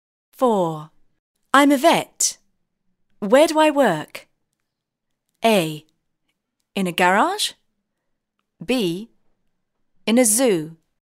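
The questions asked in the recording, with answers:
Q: I'm a vet. Where do I work?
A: B: In a zoo.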